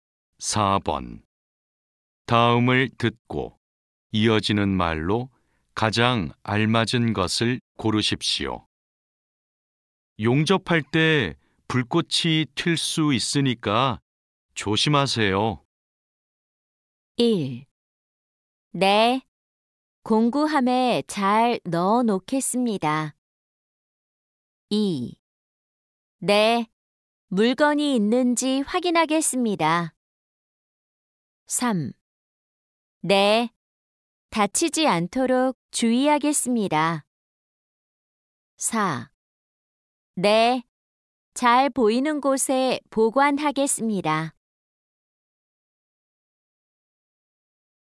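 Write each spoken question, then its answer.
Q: 용접할 때 불꽃이 튈 수 있으니까 조심하세요.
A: 3: 네, 다치지 않도록 주의하겠습니다.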